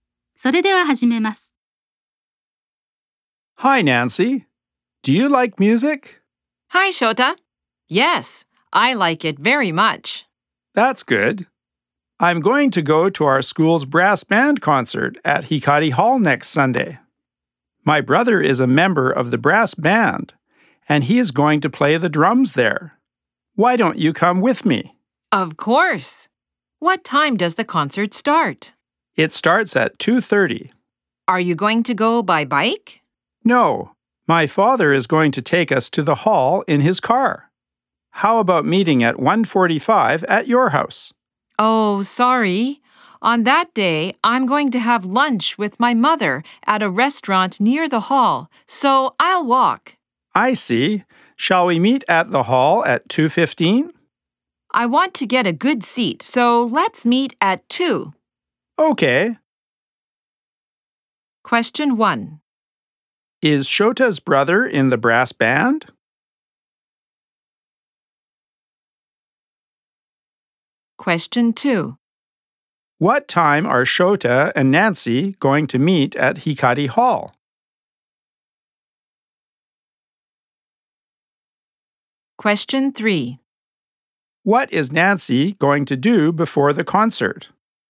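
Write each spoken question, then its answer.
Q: Is Shota's brother in the brass band?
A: Yes, he is.

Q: What time are Shota and Nancy going to meet at Hikari Hall?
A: At 2:00

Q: What is Nancy going to do before the concert?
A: Have lunch with her mother at a restaurant near the hall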